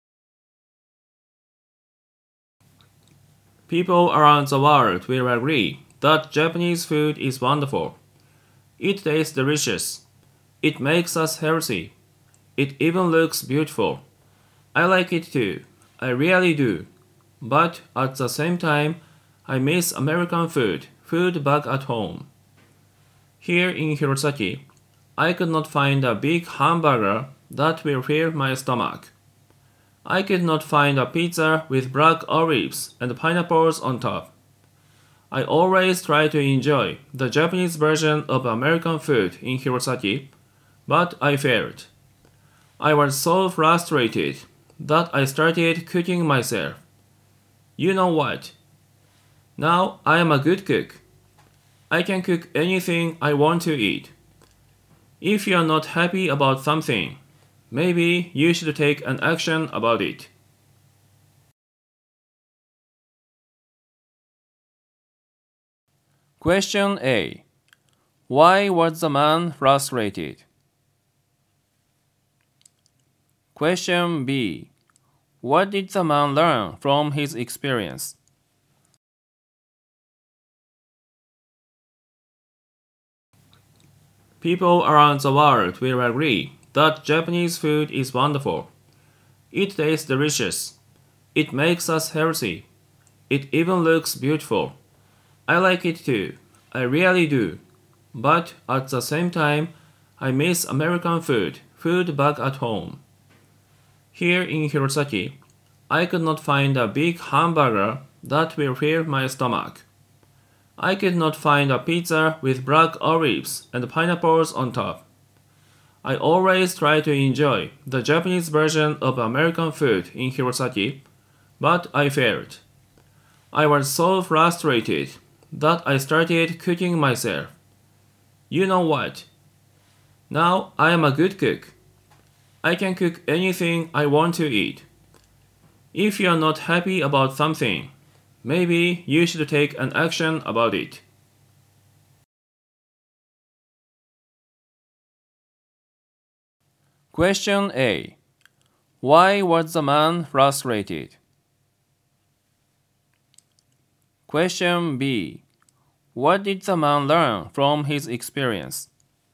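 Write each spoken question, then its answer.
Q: Why was the man frustrated?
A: He could not find the American food he missed in Hirosaki.

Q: What did the man learn from his experience?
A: If you are not happy about something, you should take action about it.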